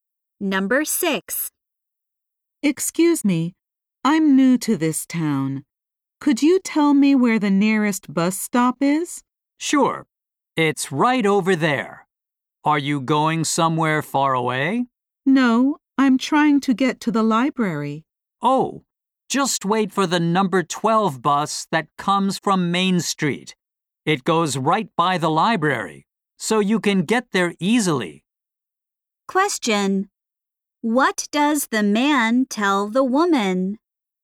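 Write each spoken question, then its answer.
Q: What does the man tell the woman?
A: Take the number 12 bus to get to the library.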